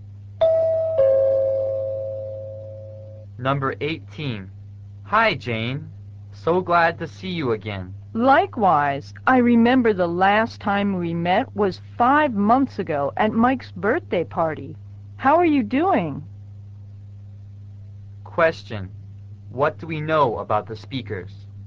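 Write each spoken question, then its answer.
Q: What do we know about the speakers?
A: They last met five months ago at Mike's birthday party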